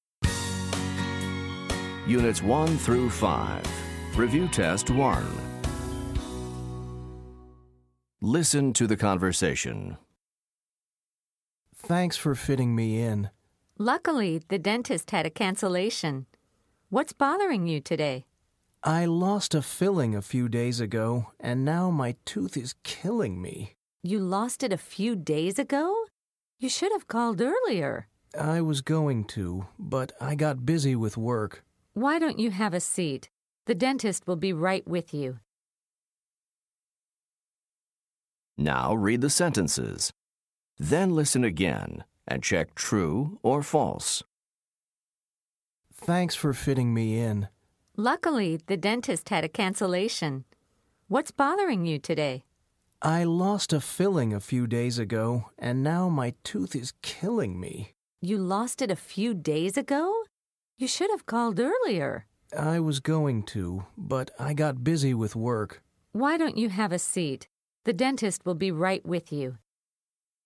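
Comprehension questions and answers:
Listen to the conversation. Then choose True or False for each sentence.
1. The patient cancelled an appointment.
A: False

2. The patient is talking to the dentist.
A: False

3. The dentist will see the patient today.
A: True

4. The patient didn't call earlier because of work.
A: True

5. The patient is in a lot of pain.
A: True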